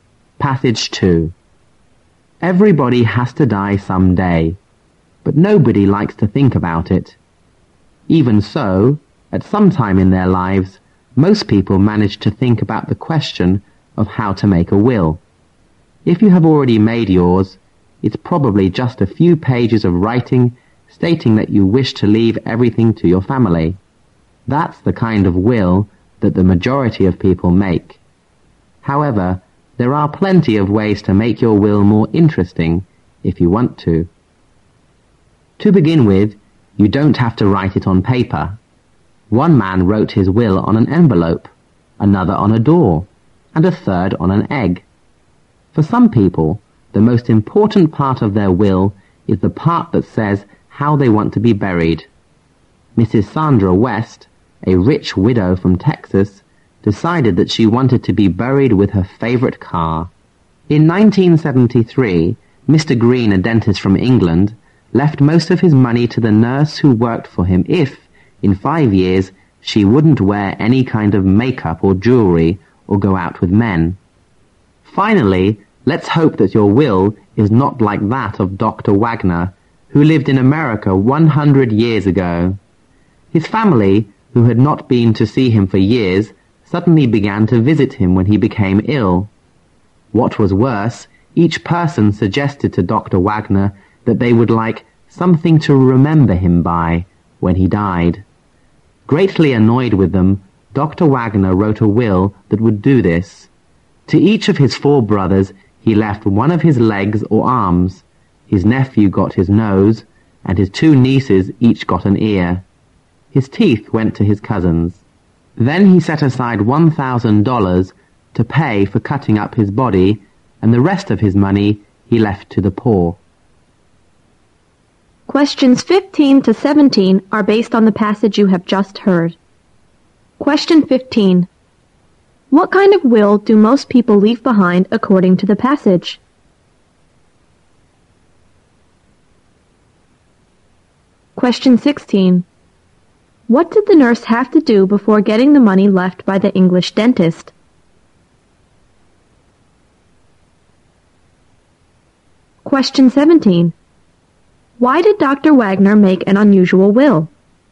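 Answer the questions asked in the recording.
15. A few written pages leaving everything to their family.
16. Go 5 years without wearing makeup or jewelry and without going out with men.
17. His family, who had ignored him for years, annoyed him by asking for keepsakes once he fell ill.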